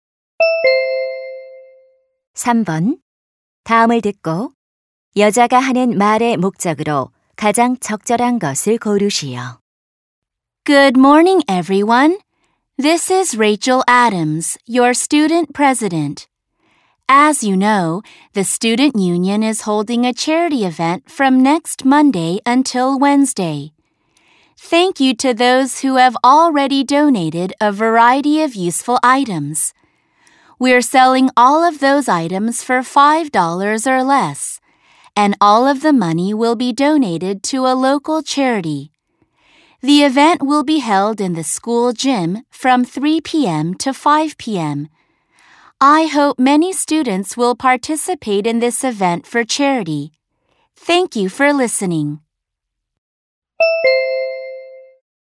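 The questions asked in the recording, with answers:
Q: 다음을 듣고 여자가 하는 말의 목적으로 가장 적절한 것을 고르시오.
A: 자선 행사 참여를 독려하려고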